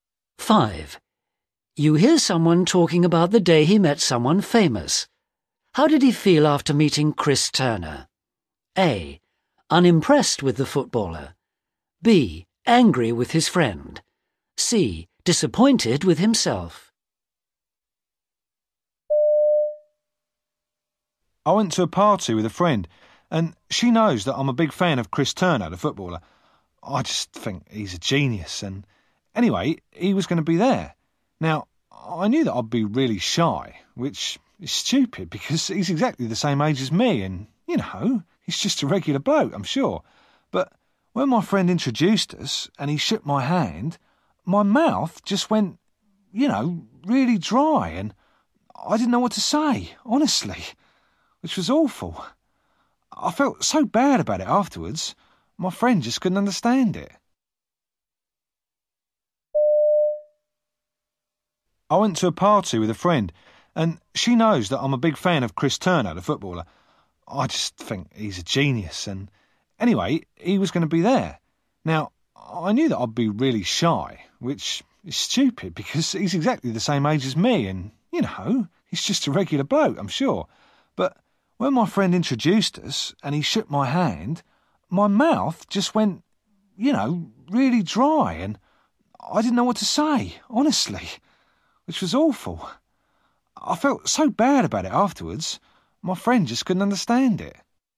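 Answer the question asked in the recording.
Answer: C: Disappointed with himself.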